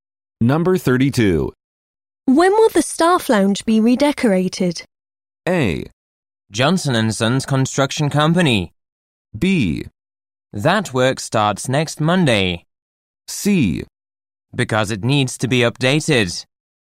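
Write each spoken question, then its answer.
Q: When will the staff lounge be redecorated?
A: B: That work starts next Monday.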